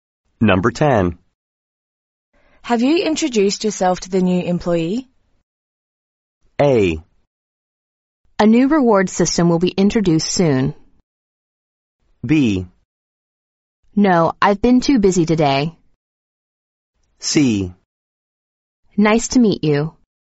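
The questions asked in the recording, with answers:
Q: Have you introduced yourself to the new employee?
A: B: No, I've been too busy today.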